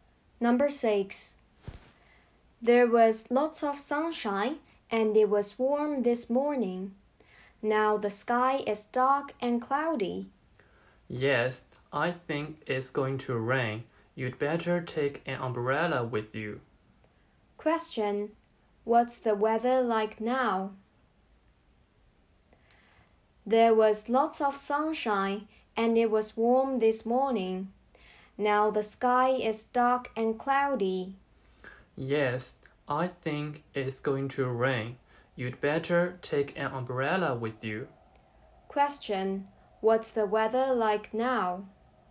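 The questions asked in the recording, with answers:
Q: What's the weather like now?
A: Dark and cloudy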